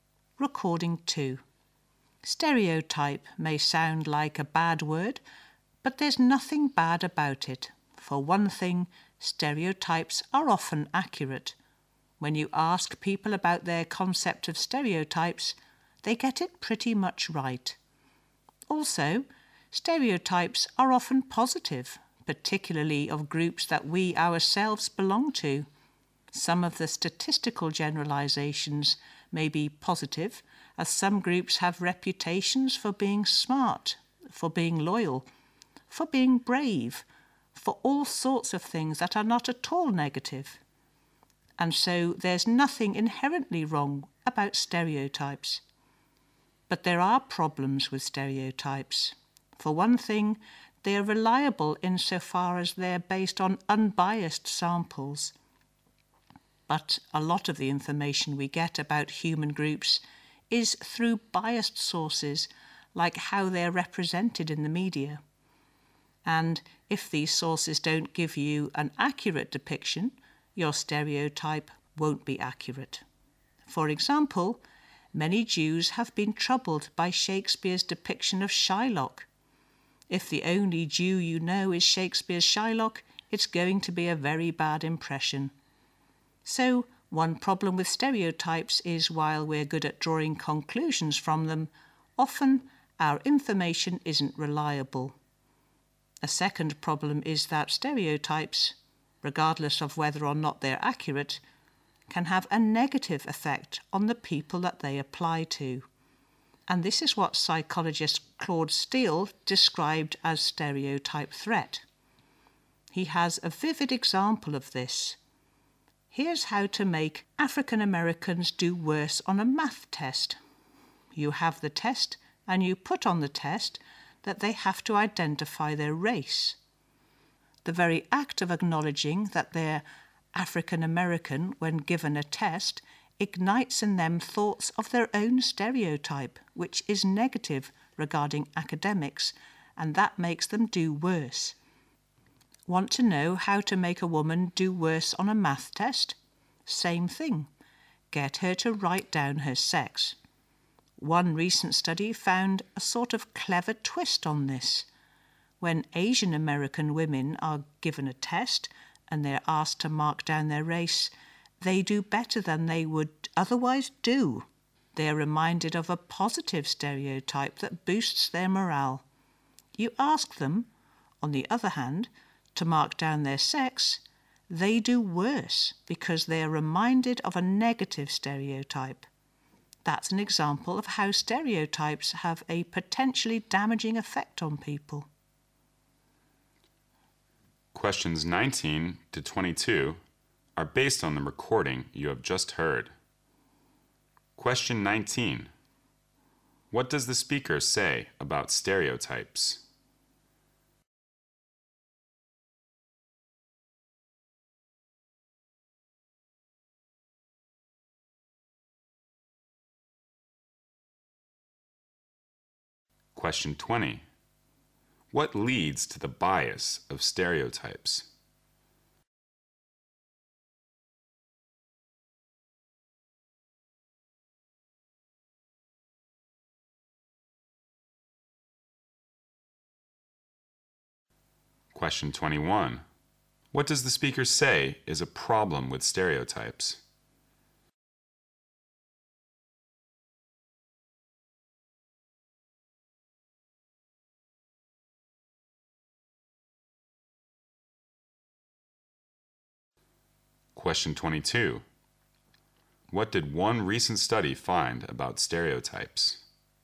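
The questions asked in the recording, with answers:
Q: What leads to the bias of stereotypes?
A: Information from biased sources, such as the media

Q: What did one recent study find about stereotypes?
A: Asian American women did better when asked to mark their race and worse when asked to mark their sex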